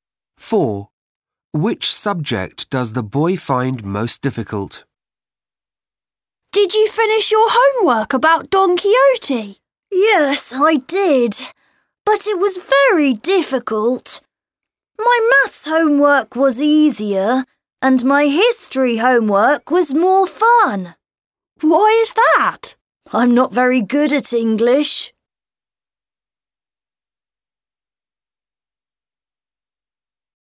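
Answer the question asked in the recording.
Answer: English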